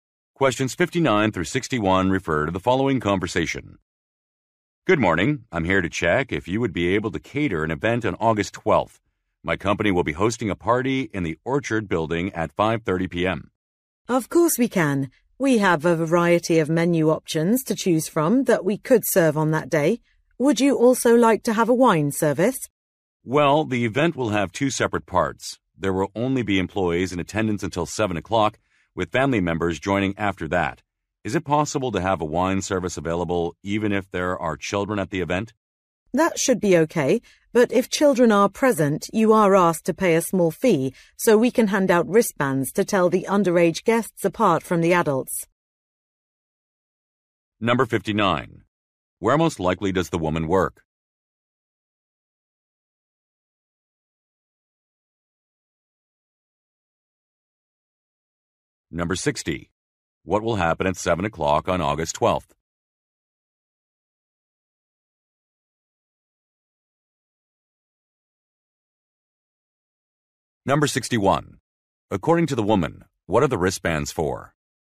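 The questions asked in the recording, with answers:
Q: Where most likely does the woman work?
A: At a catering company

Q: What will happen at 7 o'clock on August 12th?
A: Family members will join the party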